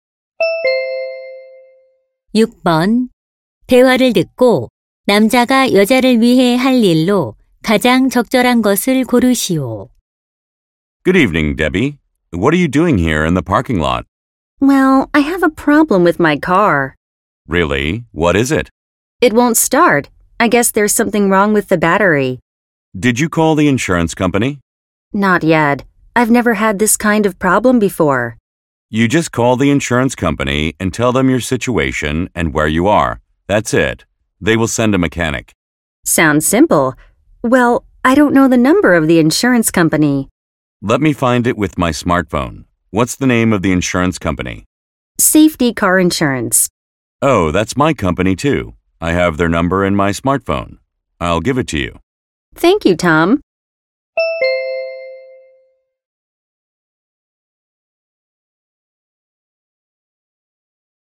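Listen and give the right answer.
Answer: 보험 회사 전화번호 알려 주기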